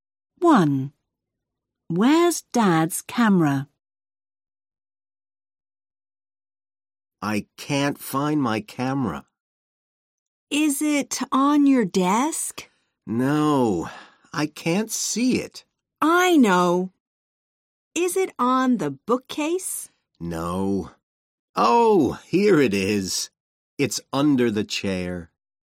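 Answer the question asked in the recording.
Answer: Under the chair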